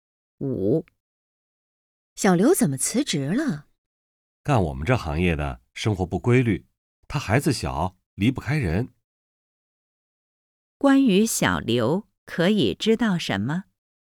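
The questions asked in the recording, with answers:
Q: 关于小刘,可以知道什么?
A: 他孩子小,离不开人,而这行业生活不规律,所以辞职了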